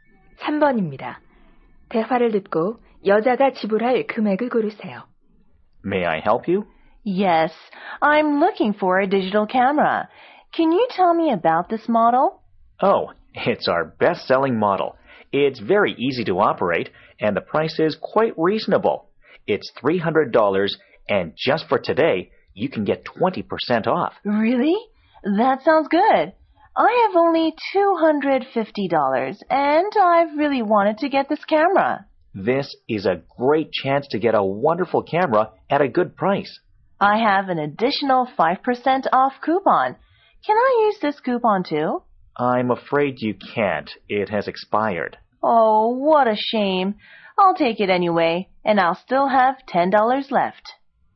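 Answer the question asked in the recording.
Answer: $240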